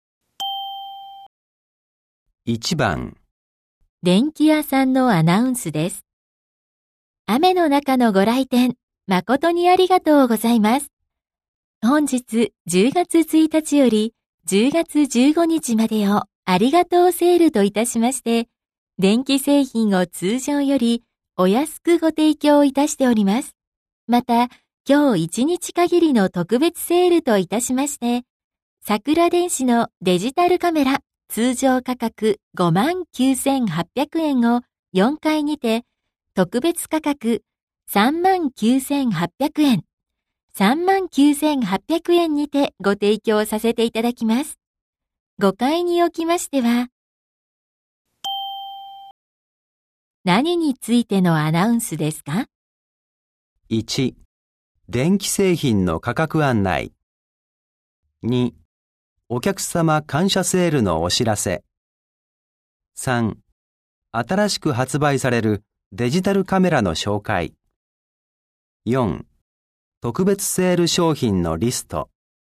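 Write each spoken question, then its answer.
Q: ご回におきましては、何についてのアナウンスですか?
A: 2: お客様感謝セールのお知らせ。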